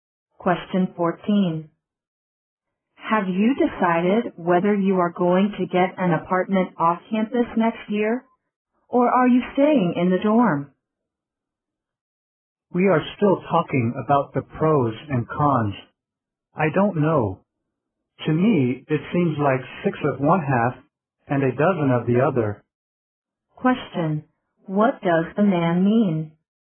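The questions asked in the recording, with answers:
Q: What does the man mean?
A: Both options seem about equal to him.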